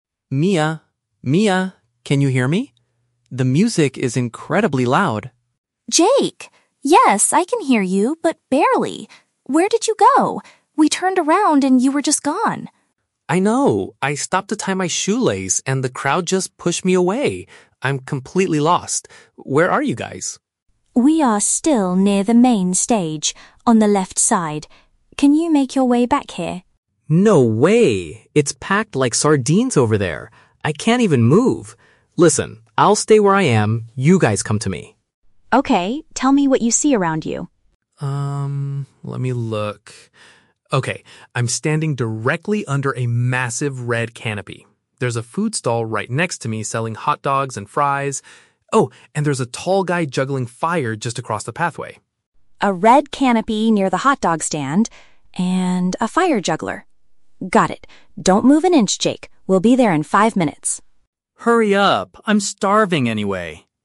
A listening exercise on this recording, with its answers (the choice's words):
Listen to a telephone conversation between two friends who got separated at a festival. Choose the correct answer (A, B, or C) for each question.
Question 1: How did the man get separated from his friends?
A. He paused for a moment to fix a piece of his footwear.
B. He went to a nearby food stall to buy some snacks.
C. He was pushed to the ground by a large group of people.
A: He paused for a moment to fix a piece of his footwear.

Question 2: Why does the man refuse to return to the main stage?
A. He cannot hear his friends clearly from that location.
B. The area is too congested for him to walk through.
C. He is feeling too exhausted to walk any further.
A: The area is too congested for him to walk through.

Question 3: How will the woman find her lost friend?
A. By meeting him at the left side of the performance area.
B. By asking a street performer for directions to his location.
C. By looking for a specific brightly colored tent.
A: By looking for a specific brightly colored tent.

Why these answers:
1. Jake says he "stopped to tie my shoelace" (which is a part of footwear). Option (A) uses paraphrasing to express this. Option (B) is a trap; a "food stall" and "hot dogs" are mentioned later, but he didn't go there to buy snacks, he just happens to be standing near it. Option (C) is a trap; the crowd "pushed" him away, but he was not pushed "to the ground".
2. Jake says the area near the stage is "packed like sardines" (an idiom meaning extremely crowded/congested) and that he "can't even move." Option (B) accurately paraphrases this situation. Option (A) is a trap; the music is loud and hearing is difficult, but that's not his reason for not walking back. Option (C) is a plausible guess, but exhaustion is not mentioned.
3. Jake describes his location by saying he is standing "under a massive red canopy." A canopy is a type of tent or cover. Option (C) uses synonyms ("brightly colored" = red, "tent" = canopy). Option (A) is a trap; the "left side" of the main stage (performance area) is where the woman currently is, not where she will find the man. Option (B) is a trap; a street performer (fire juggler) is near the man, but the woman does not need to ask him for directions.

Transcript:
Jake: Mia? Mia, can you hear me? The music is incredibly loud!
Mia: Jake! Yes, I can hear you, but barely. Where did you go? We turned around and you were just gone!
Jake: I know, I stopped to tie my shoelace and the crowd just pushed me away. I'm completely lost. Where are you guys?
Mia: We are still near the main stage, on the left side. Can you make your way back here?
Jake: No way, it's packed like sardines over there. I can't even move. Listen, I'll stay where I am. You guys come to me.
Mia: Okay, tell me what you see around you.
Jake: Um, let me look. Okay, I'm standing directly under a massive red canopy. There's a food stall right next to me selling hot dogs and fries. Oh, and there's a tall guy juggling fire just across the pathway.
Mia: A red canopy near the hot dog stand... and a fire juggler. Got it! Don't move an inch, Jake. We'll be there in five minutes.